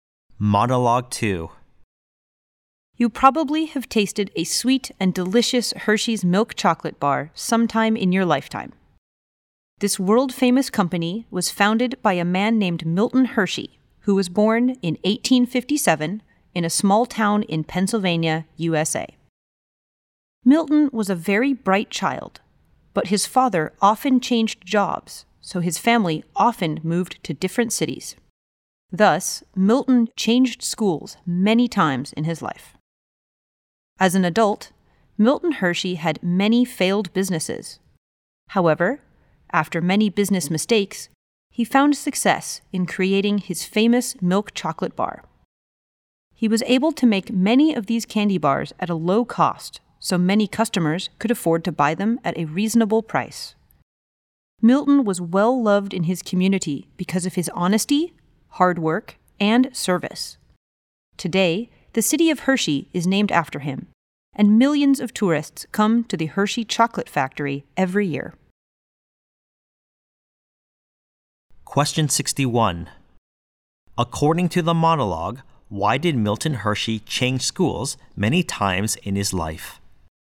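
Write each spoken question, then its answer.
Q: According to the monologue, why did Milton Hershey change schools many times in his life?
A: His father often changed jobs, so the family often moved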